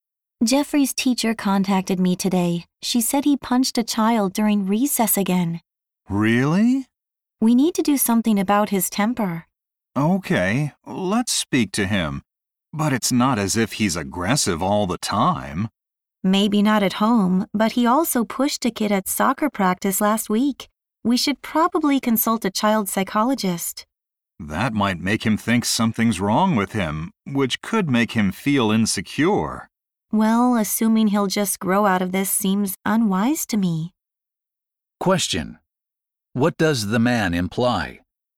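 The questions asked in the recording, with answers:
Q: What does the man imply?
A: They should not simply wait for Jeffrey to grow out of his behavior; they should take action such as consulting a psychologist.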